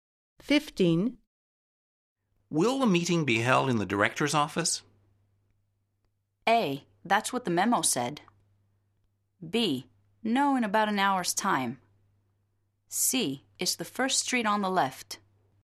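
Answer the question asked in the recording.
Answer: A: That's what the memo said.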